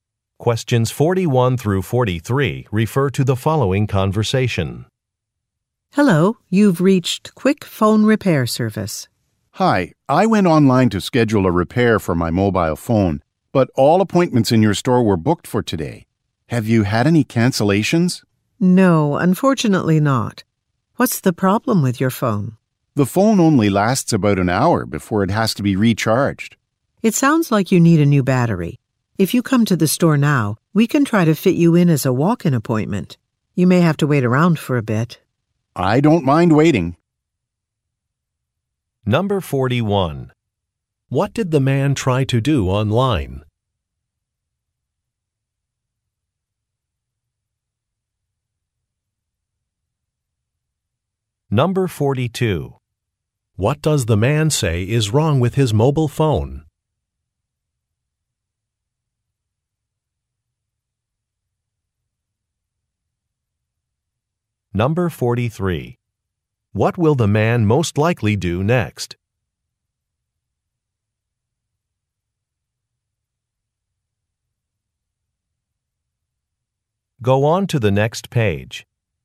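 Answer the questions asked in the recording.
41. Schedule a phone repair appointment
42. The battery only lasts about an hour
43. Go to the store as a walk-in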